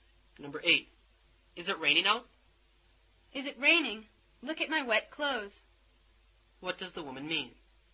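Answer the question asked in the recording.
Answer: Yes, it is raining.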